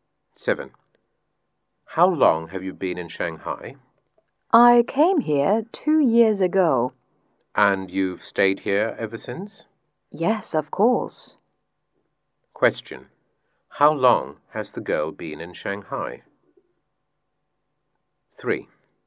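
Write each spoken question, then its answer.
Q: How long has the girl been in Shanghai?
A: For 2 years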